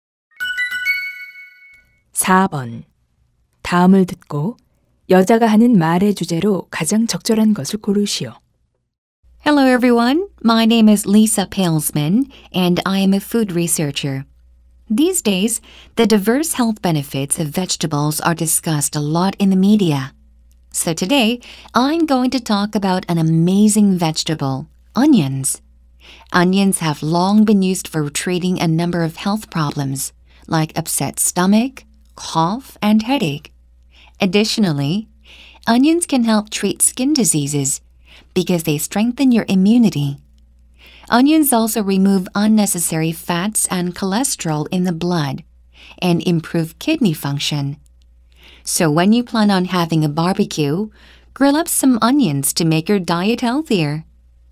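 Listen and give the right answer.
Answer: 양파가 건강에 주는 이점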